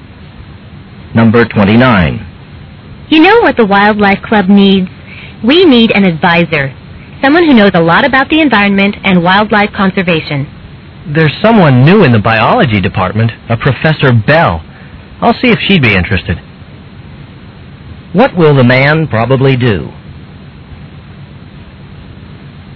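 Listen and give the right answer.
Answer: Ask Professor Bell to be the club's advisor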